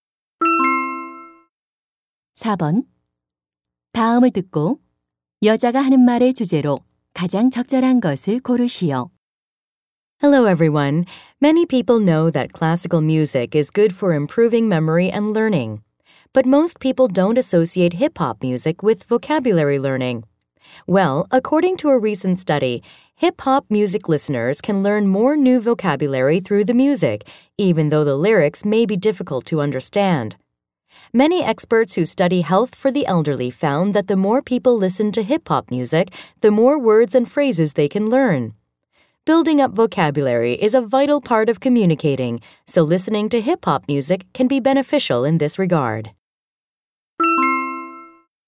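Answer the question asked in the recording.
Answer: 힙합 음악이 어휘 학습에 도움이 된다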